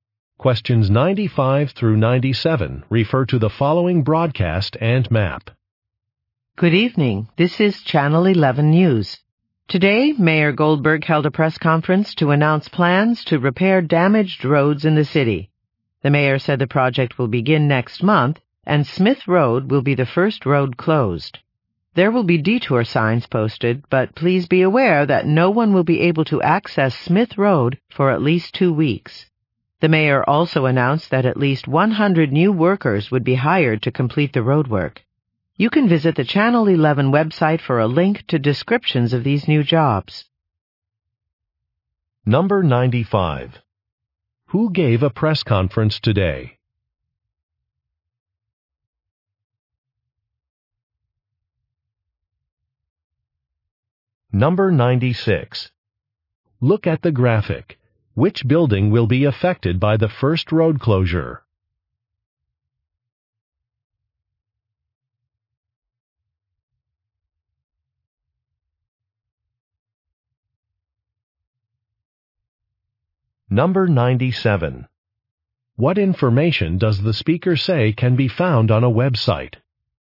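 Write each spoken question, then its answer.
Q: Who gave a press conference today?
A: The mayor (Mayor Goldberg)

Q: What information does the speaker say can be found on a website?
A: Descriptions of the new roadwork jobs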